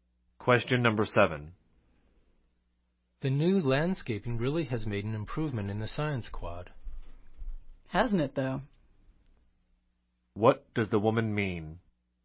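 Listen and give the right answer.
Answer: She agrees the new landscaping has improved the science quad.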